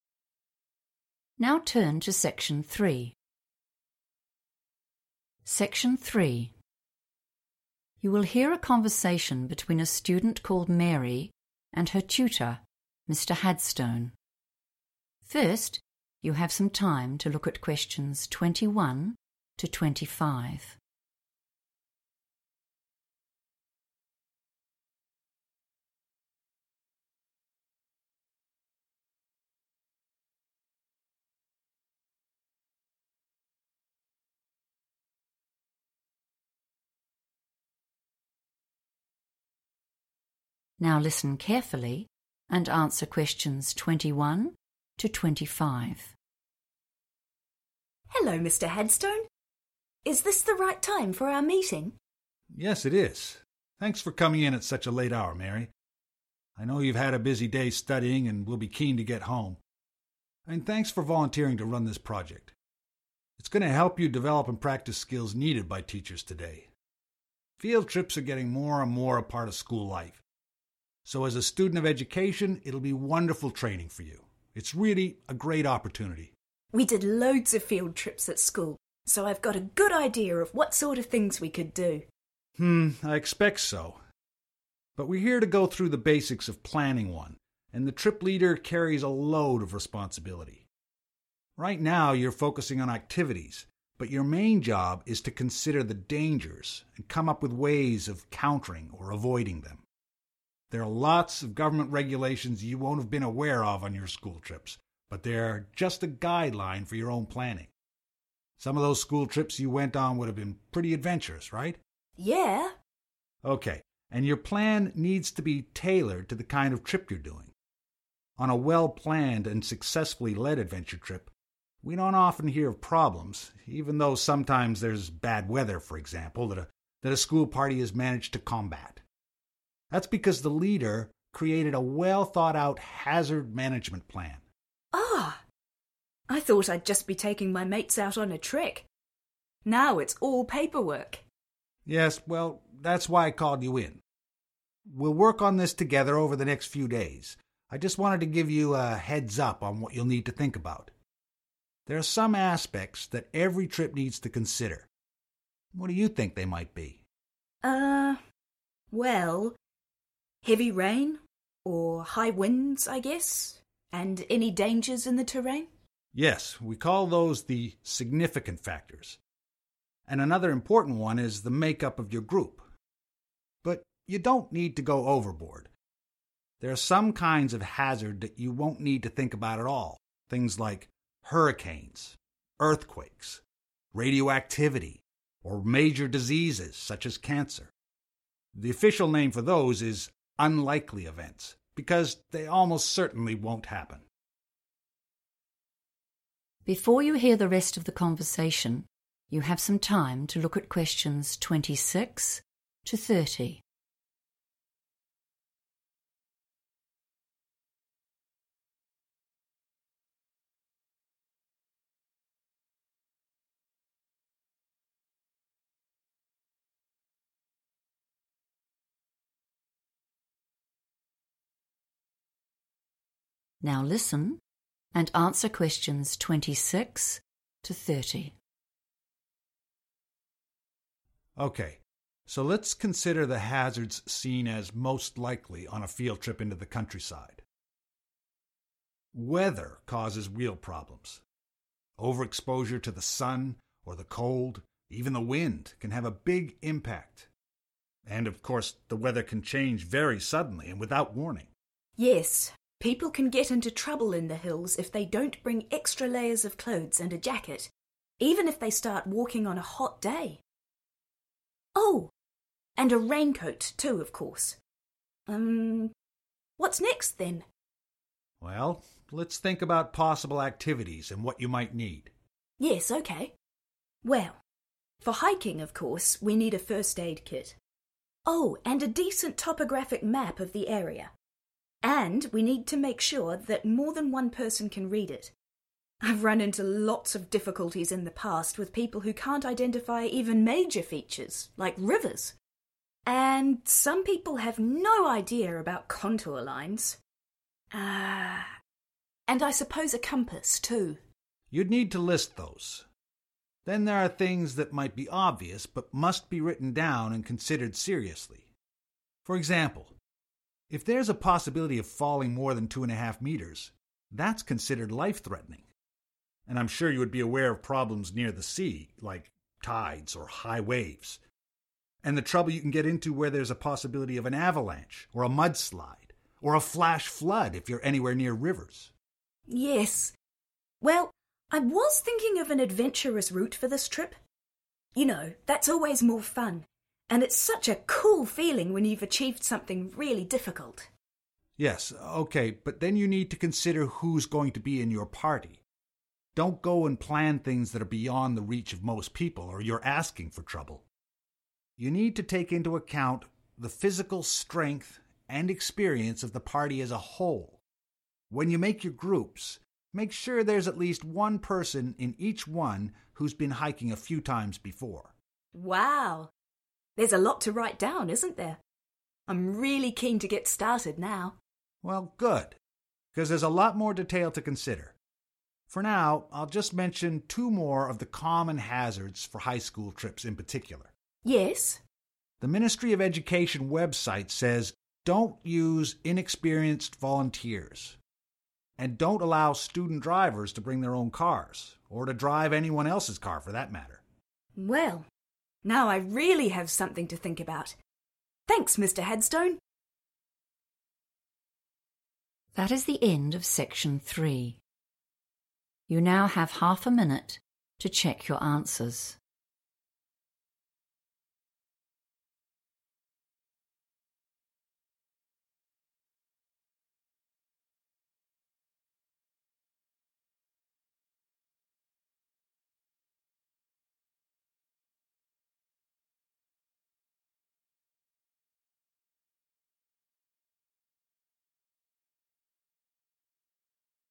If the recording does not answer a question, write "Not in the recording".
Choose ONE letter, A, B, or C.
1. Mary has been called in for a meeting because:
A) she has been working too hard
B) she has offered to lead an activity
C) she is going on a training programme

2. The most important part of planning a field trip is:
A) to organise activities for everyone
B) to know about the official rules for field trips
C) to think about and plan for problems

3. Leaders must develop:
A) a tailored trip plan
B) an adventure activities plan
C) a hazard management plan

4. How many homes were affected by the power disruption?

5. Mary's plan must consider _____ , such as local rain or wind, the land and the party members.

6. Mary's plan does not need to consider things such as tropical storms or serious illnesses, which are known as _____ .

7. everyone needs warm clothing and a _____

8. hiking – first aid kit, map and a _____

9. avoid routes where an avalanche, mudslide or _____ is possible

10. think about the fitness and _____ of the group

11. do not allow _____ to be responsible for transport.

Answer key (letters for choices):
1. B
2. C
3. C
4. Not in the recording
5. significant factors / factors
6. unlikely events / events
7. raincoat
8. compass
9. flash flood
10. experience
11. student drivers

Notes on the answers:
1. The correct answer is B because at the start of the meeting, the teacher (Tutor) thanks Mary for 'volunteering' to run the project. This word means she offered to do the work herself. He then explains that as the 'trip leader,' she has a lot of responsibilities to plan for. This confirms her role as the person leading the activity.
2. The correct answer is C because the tutor specifically states that the student's 'main job'—which is a synonym for the most important part—is to 'consider the dangers' and find ways to 'counter' or 'avoid' them. Although the student is initially thinking about 'activities' (Option A) and the tutor mentions rules or 'regulations' (Option B), the tutor clarifies that thinking about hazards and problems is the primary priority for a leader.
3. The correct answer is C because the tutor explains that the most important part of a leader's job is to think about dangers and how to avoid them. He states that a good leader avoids problems by making a 'hazard management plan.' In this context, 'hazard' is another word for danger or risk, and 'management' means how you handle those risks to keep everyone safe.
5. The correct answer is 'significant factors' because the tutor uses this specific title to group together various elements that Mary lists or needs to consider. The student mentions weather (heavy rain, high winds) and the land (dangers in the terrain), and the tutor calls these 'significant factors' before adding the 'make-up of your group' (the party members) to that list.
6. The correct answer is based on the tutor's explanation of things Mary does not need to worry about when planning her trip. He lists examples like 'hurricanes' (which are tropical storms) and 'cancer' (which is a serious illness). He then specifies that the 'official name' for these types of hazards is 'unlikely events' because they are not expected to occur.
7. The correct answer is "raincoat" because the student identifies it as a necessary item for hikers to carry. While discussing weather-related hazards, the student mentions that people should bring extra layers, a jacket, and specifically a raincoat to handle changes in the weather.
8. The correct answer is supported by the student's list of necessary items for a hiking trip. When discussing what is needed for hiking, the student mentions three specific tools: a first aid kit, a topographic map, and a compass. This matches the structure of the notes requiring a third item to join the first aid kit and map.
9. The correct answer is determined by the tutor's list of dangerous situations that must be taken seriously when planning the field trip activities. He groups "avalanche" and "mudslide" together with "flash flood" as hazards that can cause a lot of trouble, particularly near rivers. Since the notes ask for a hazard similar to an avalanche or mudslide that usually occurs on specific routes, "flash flood" is the only term from the script that completes this list.
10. The correct answer is supported by the tutor's advice regarding the members of the hiking party. He emphasizes that the trip leader must look at the 'physical strength' (which is a synonym for 'fitness') and the 'experience' of the group members to ensure the activities are not too difficult for them. This ensures the safety and success of the trip.
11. The correct answer is student drivers because the tutor talks about safety rules for the trip. He mentions that the government website advises against letting students drive their own or others' cars. In the provided notes, 'to be responsible for transport' means the same thing as driving cars for the trip. Therefore, 'student drivers' is the group of people who should not be in charge of moving others to the destination.

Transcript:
STUDENT: Hello, Mr Hadstone. Is this the right time for our meeting?
TUTOR: Yes, it is. Thanks for coming in at such a late hour, Mary. I know you've had a busy day studying and will be keen to get home ... and thanks for volunteering to run this project. It's going to help you develop and practise skills needed by teachers today. Field trips are getting more and more a part of school life, so as a student of education it'll be wonderful training for you. It's really a great opportunity.
STUDENT: We did loads of field trips at school, so I've got a good idea of what sort of things we could do.
TUTOR: Hmm, I expect so, but we're here to go through the basics of planning one, and the trip leader carries a load of responsibility. Right now, you're focusing on activities, but your main job is to consider the dangers, and come up with ways of countering or avoiding them. There are lots of government regulations you won't have been aware of on your school trips, but they are just a guideline for your own planning....some of those school trips you went on would have been pretty adventurous, right?
STUDENT: Yeah.
TUTOR: OK, and your plan needs to be tailored to the kind of trip you're doing. On a well-planned and successfully led adventure trip, we don't often hear of problems ... even though sometimes there's bad weather, for example, that a school party has managed to combat. That's because the leader created a well thought out hazard management plan.
STUDENT: Oh, I thought I'd just be taking my mates out on a trek – now it's all paperwork!
TUTOR: Yes, well, that's why I called you in. We'll work on this together over the next few days – I just wanted to give you a heads-up on what you'll need to think about. There are some aspects that every trip needs to consider. What do you think they might be?
STUDENT: Uh ... well ...heavy rain, or high winds, I guess, and any dangers in the terrain...
TUTOR: Yes, we call those the significant factors ... and another important one is the make-up of your group. But, you don't need to go overboard. There are some kinds of hazard you won't need to think about at all: things like hurricanes, earthquakes, radioactivity, or major diseases such as cancer. The official name for those is unlikely events, because they almost certainly won't happen.
Before you hear the rest of the conversation, you have some time to look at questions 26 to 30.
Now listen and answer questions 26 to 30.
TUTOR: OK, so let's consider the hazards seen as most likely on a field trip into the countryside. Weather causes real problems – overexposure to the sun or the cold – even the wind can have a big impact. And, of course, the weather can change very suddenly and without warning.
STUDENT: Yes, people can get into trouble in the hills if they don't bring extra layers of clothes and a jacket – even if they start walking on a hot day. Oh ... and a raincoat, too, of course. Umm ...what's next then?
TUTOR: Well, let's think about possible activities and what you might need.
Well, for hiking of course we need a first aid kit. Oh ... and a decent topographic map of the area. And we need to make sure that more than one person can read it. I've run into lots of difficulties in the past with people who can't identify even major features, like rivers. And some people have no idea about contour lines. Ah....and I suppose a compass, too.
TUTOR: You'd need to list those. Then there are things that may be obvious, but must be written down and considered seriously. For example, if there's a possibility of falling more than 2.5 meters, that's considered life threatening, and I'm sure you would be aware of problems near the sea, like tides or high waves – and the trouble you can get into where there's a possibility of an avalanche or a mudslide ... or a flash flood, if you're anywhere near rivers.
STUDENT: Yes, well, I was thinking of an adventurous route for this trip ... you know, that's always more fun, and it's such a cool feeling when you've achieved something really difficult.
TUTOR: Yes, OK, but then you need to consider who's going to be in your party.... don't go and plan things that are beyond the reach of most people, or you're asking for trouble. You need to take into account the physical strength and experience of the party as a whole. When you make your groups, make sure there's at least one person in each one who's been hiking a few times before.
STUDENT: Wow, there's a lot to write down, isn't there? I'm really keen to get started now.
TUTOR: Well, good, because there's a lot more detail to consider. For now, I'll just mention two more of the common hazards for high school trips, in particular.
STUDENT: Yes?
TUTOR: The Ministry of Education website says – don't use inexperienced volunteers, and don't allow student drivers to bring their own cars, or to drive anyone else's car, for that matter.
STUDENT: Well ... now I really have something to think about! Thanks, Mr Hadstone.
That is the end of section 3. You now have half a minute to check your answers.